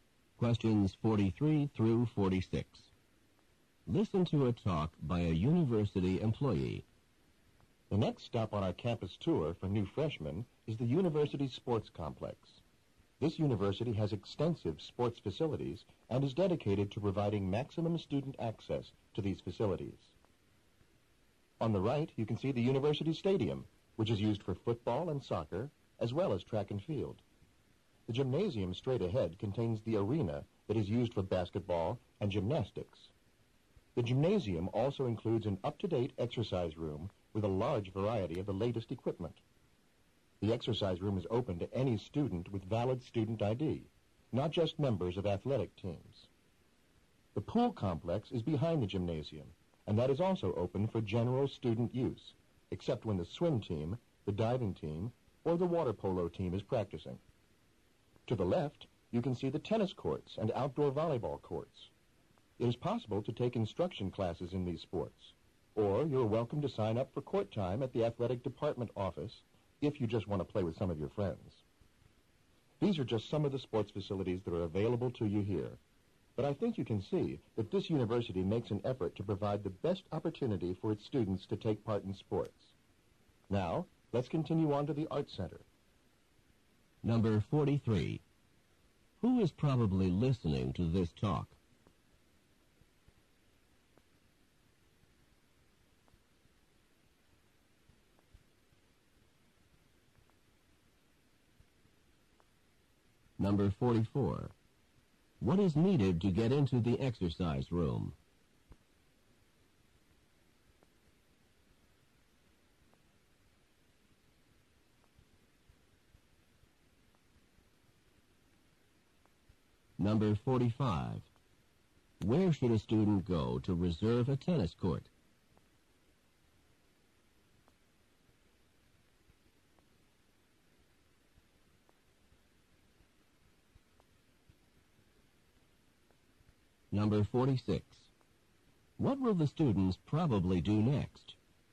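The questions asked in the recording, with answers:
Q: Who is probably listening to this talk?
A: New freshmen

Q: What is needed to get into the exercise room?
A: A valid student ID

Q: Where should a student go to reserve a tennis court?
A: The athletic department office

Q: What will the students probably do next?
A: Go to the Art Center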